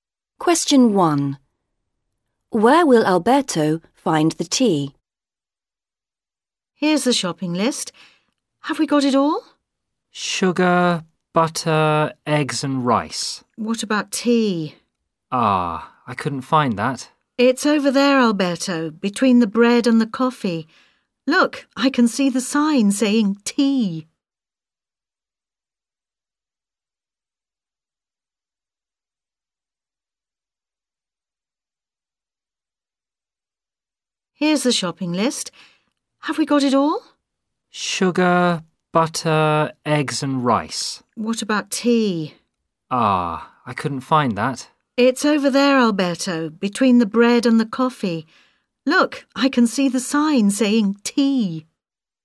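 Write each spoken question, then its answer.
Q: Where will Alberto find the tea?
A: Between the bread and the coffee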